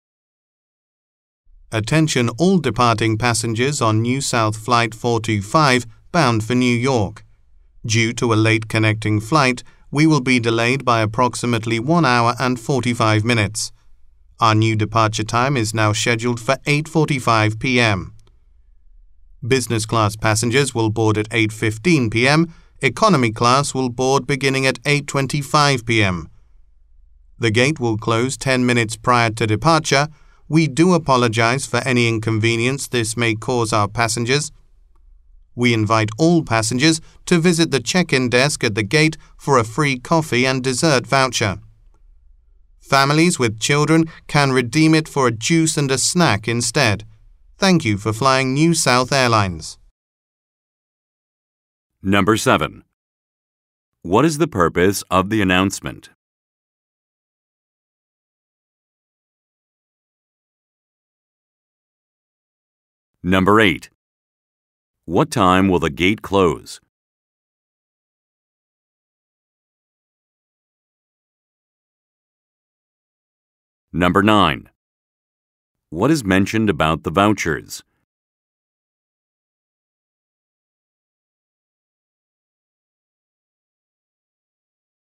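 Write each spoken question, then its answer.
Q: What is the purpose of the announcement?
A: To announce a flight delay

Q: What time will the gate close?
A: 8:35 p.m.

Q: What is mentioned about the vouchers?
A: They are for free coffee and dessert, or juice and a snack for families with children, at the gate check-in desk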